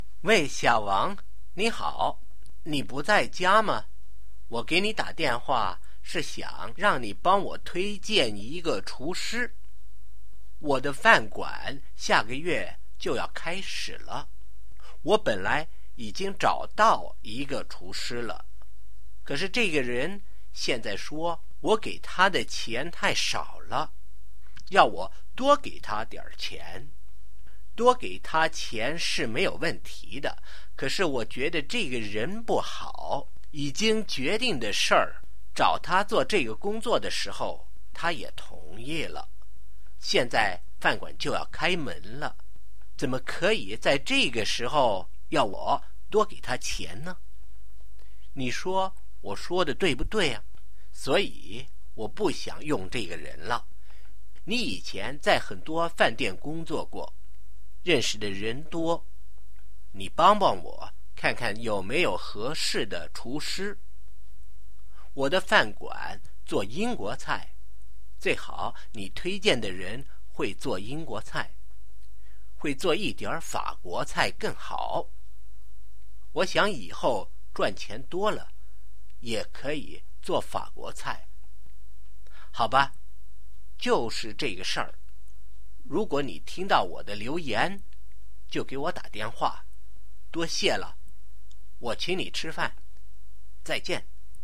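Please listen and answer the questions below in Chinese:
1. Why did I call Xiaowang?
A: 想让小王推荐一个厨师

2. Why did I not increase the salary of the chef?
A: 觉得这个人不好,已经同意了的事,饭馆快开门了又要多给钱

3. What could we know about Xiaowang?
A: 他以前在很多饭店工作过,认识的人多

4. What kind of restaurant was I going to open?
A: 英国菜饭馆

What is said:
喂,小王,你好!你不在家吗?我给你打电话是想让你帮我推荐一个厨师。我的饭馆下个月就要开始了,我本来已经找到一个厨师了,可是这个人现在说我给的钱太少了,要我多给他点儿钱?多给他钱是没问题的,可是我觉得这个人不好,已经决定的事儿,找他做这个工作的时候他也同意了,现在饭馆就要开门了,怎么可以在这个时候要我多给钱呢?你说我说得对不对?所以我不想用这个人了。你以前在很多饭店工作过,认识的人多,你帮帮我,看看有没有合适的厨师。我的饭馆做英国菜,最好你推荐的人会做英国菜,会做一点儿法国菜更好,我想以后赚钱多了,也可以做法国菜。好吧,就是这个事儿,如果你听到我的留言,就给我打电话。多谢了,我请你吃饭。再见!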